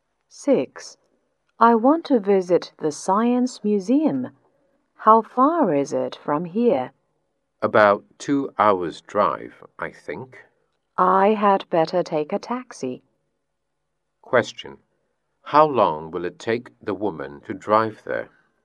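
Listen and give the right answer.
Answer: About 2 hours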